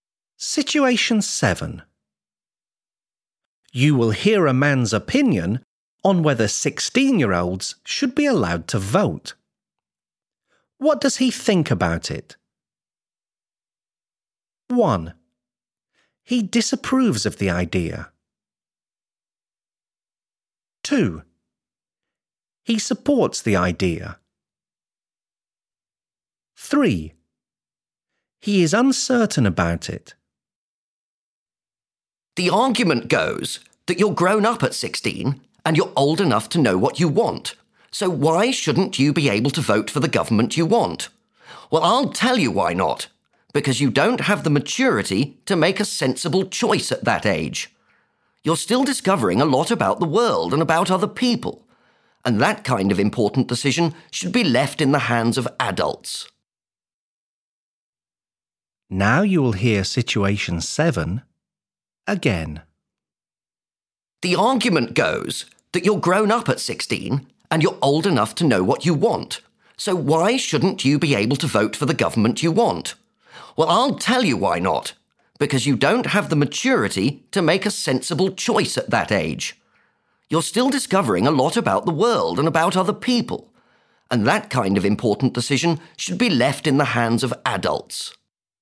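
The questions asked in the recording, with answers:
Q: What does he think about it?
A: 1: He disapproves of the idea.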